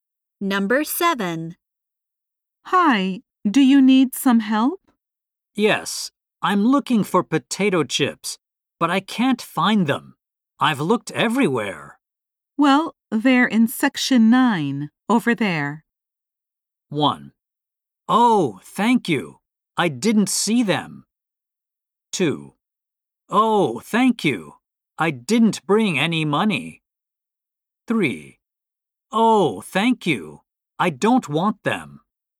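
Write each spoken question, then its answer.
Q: Well, they're in section 9, over there.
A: 1: Oh, thank you. I didn't see them.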